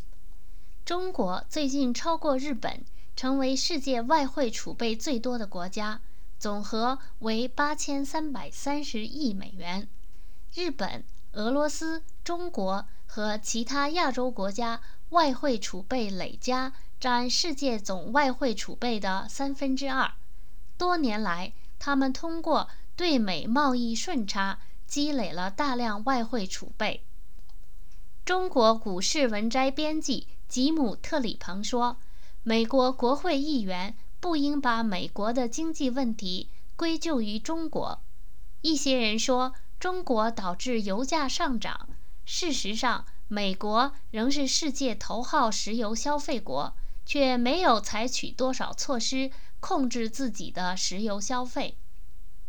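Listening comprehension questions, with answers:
Please answer the following questions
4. In what way did China, Japan and Russia increase their foreign currency reserve?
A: Through their trade surpluses with the US

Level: M.Phil Year 2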